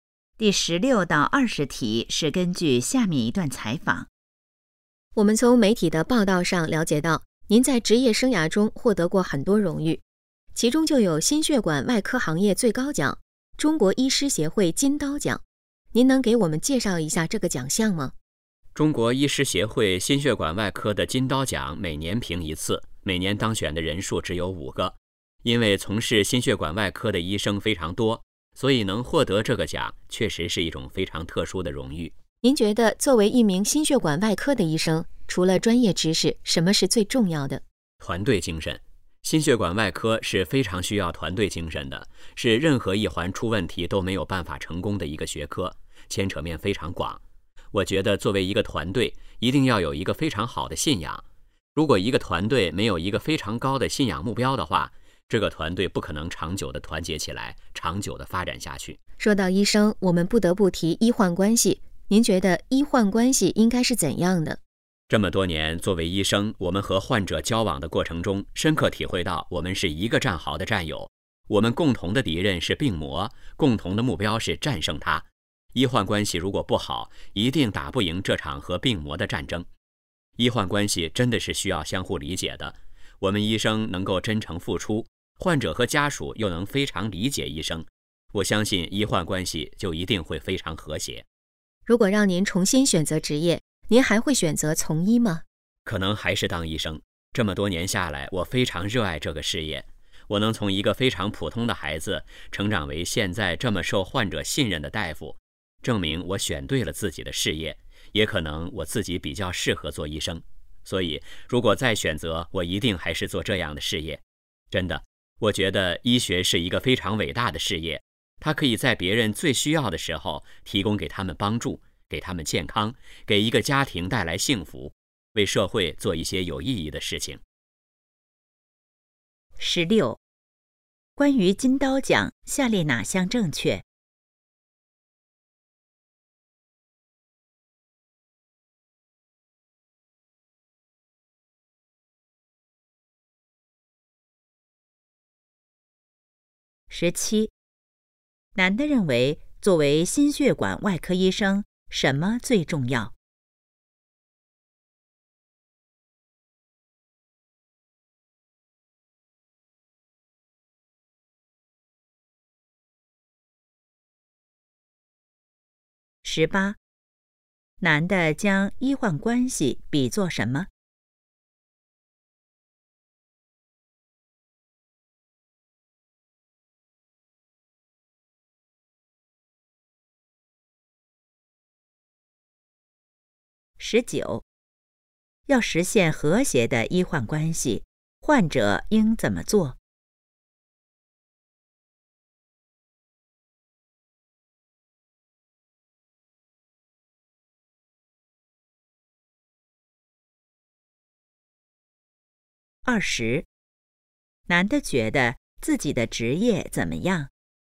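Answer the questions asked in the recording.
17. 团队精神
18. 一个战壕的战友
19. 理解医生
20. 很伟大,他非常热爱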